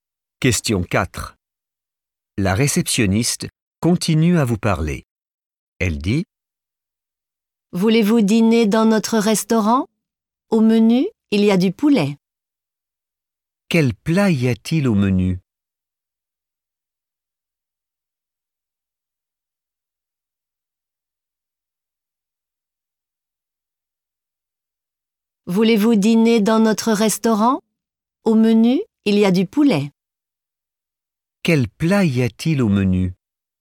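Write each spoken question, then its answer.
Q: Quel plat y a-t-il au menu?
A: du poulet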